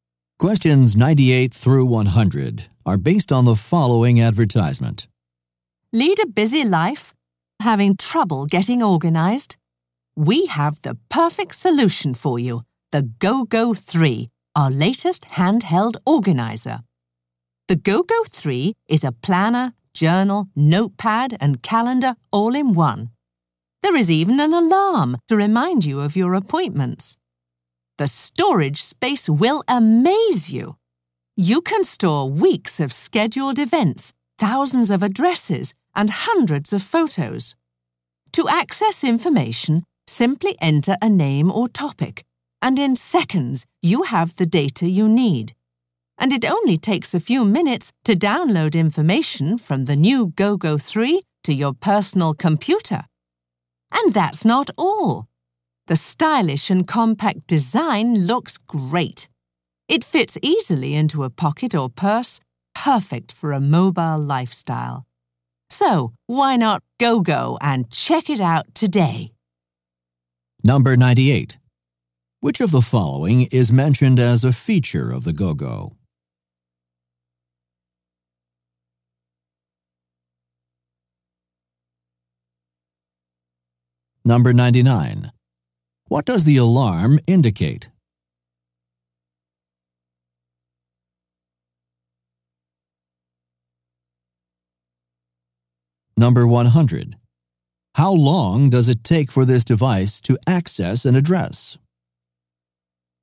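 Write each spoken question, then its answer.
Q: What does the alarm indicate?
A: Appointments

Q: How long does it take for this device to access an address?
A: Seconds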